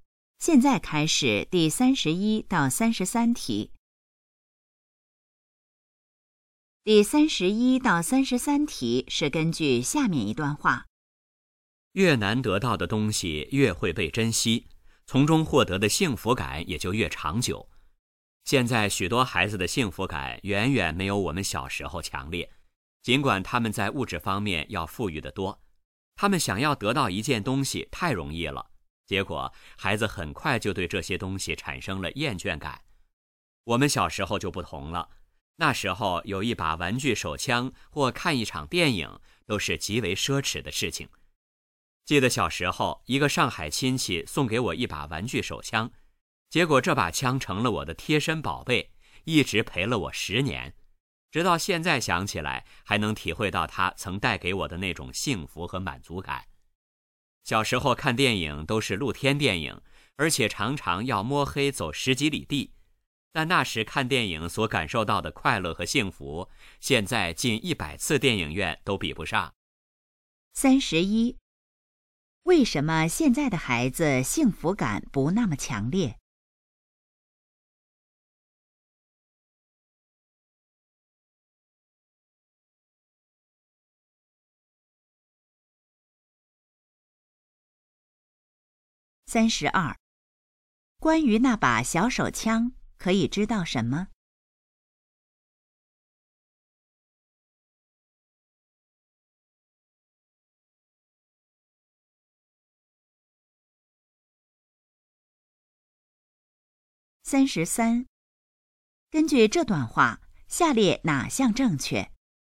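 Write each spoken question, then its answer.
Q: 为什么现在的孩子幸福感不那么强烈?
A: 他们想得到东西太容易了

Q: 关于那把小手枪,可以知道什么?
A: 是上海亲戚送的,陪了我10年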